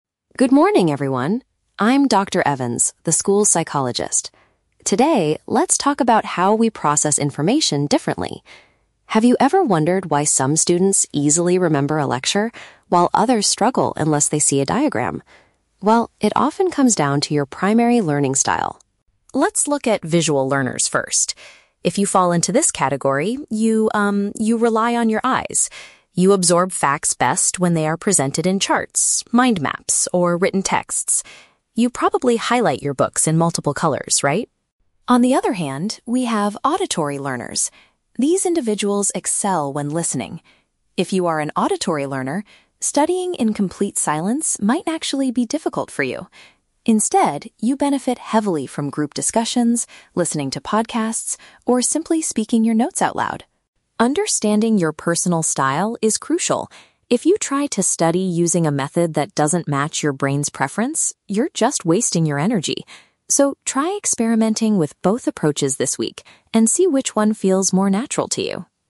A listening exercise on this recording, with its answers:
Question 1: How do visual learners prefer to take in new information?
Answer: By looking at graphical representations and written notes.

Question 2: What strategy is recommended for individuals who are auditory learners?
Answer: Saying their study materials out loud.

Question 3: What is Dr. Evans's final advice for the audience?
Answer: To test different study techniques to find what suits them best.

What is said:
Dr. Evans: Good morning, everyone. I'm Dr. Evans, the school psychologist. Today, let's talk about how we process information differently. Have you ever wondered why some students easily remember a lecture, while others struggle unless they see a diagram? Well, it often comes down to your primary learning style.
Let's look at visual learners first. If you fall into this category, you, um, you rely on your eyes. You absorb facts best when they are presented in charts, mind maps, or written texts. You probably highlight your books in multiple colors, right?
On the other hand, we have auditory learners. These individuals excel when listening. If you are an auditory learner, studying in complete silence might actually be difficult for you. Instead, you benefit heavily from group discussions, listening to podcasts, or simply speaking your notes out loud.
Understanding your personal style is crucial. If you try to study using a method that doesn't match your brain's preference, you're just wasting your energy. So, try experimenting with both approaches this week and see which one feels more natural to you.